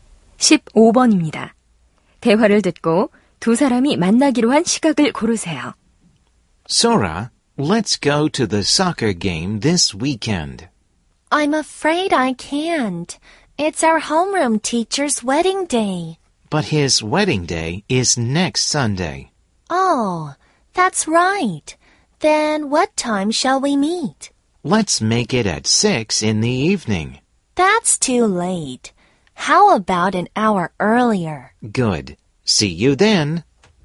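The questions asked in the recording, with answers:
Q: 대화를 듣고 두 사람이 만나기로 한 시각을 고르세요.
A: 오후 5시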